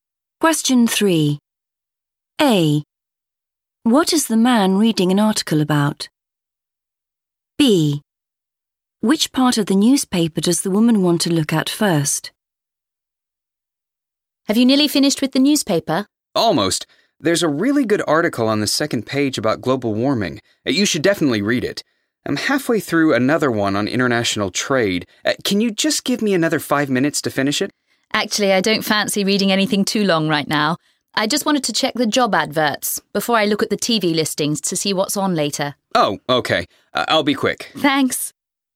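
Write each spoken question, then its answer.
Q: What is the man reading an article about?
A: international trade

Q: Which part of the newspaper does the woman want to look at first?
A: the job adverts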